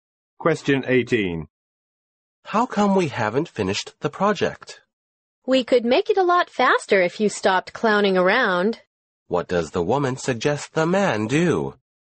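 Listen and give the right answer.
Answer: Stop clowning around and work seriously.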